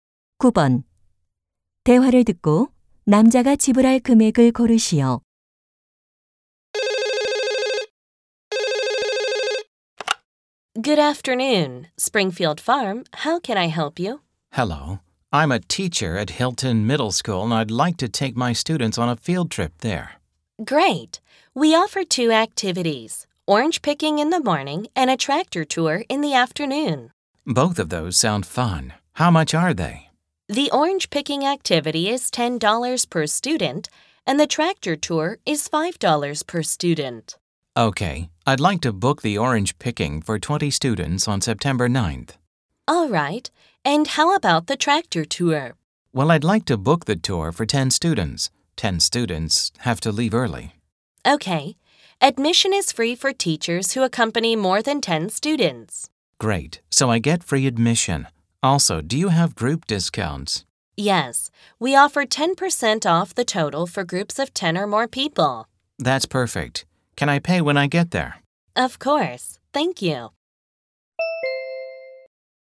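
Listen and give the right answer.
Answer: 225달러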